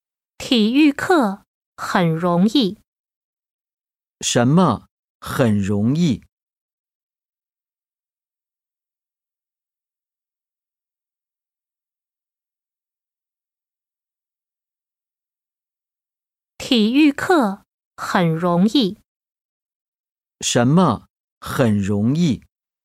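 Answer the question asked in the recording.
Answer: 体育课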